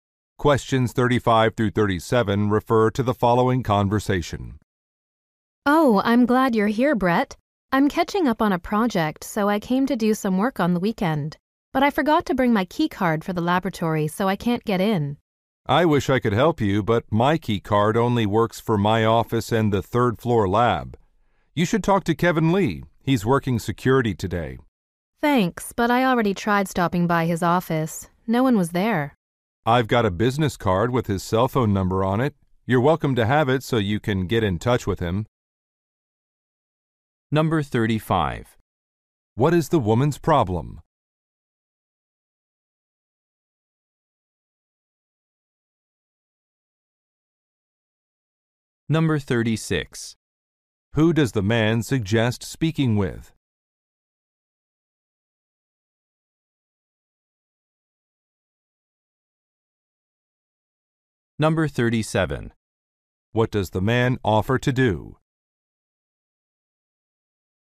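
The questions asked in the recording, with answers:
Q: What is the woman's problem?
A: She forgot her key card and can't get into the laboratory

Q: Who does the man suggest speaking with?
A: Kevin Lee, who is working security

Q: What does the man offer to do?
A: Give her a business card with Kevin Lee's cell phone number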